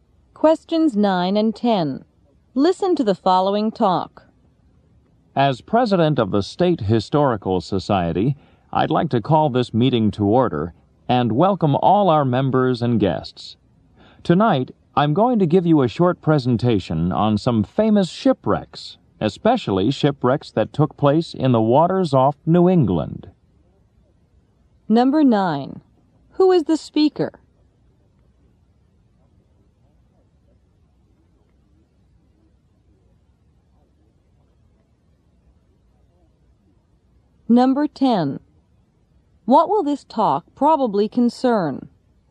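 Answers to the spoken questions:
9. The president of the State Historical Society
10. Famous shipwrecks off New England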